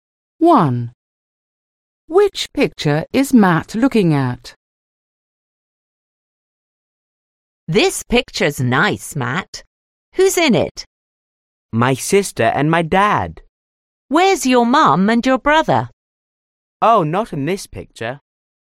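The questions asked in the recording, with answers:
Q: Which picture is Matt looking at?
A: The picture of his sister and his dad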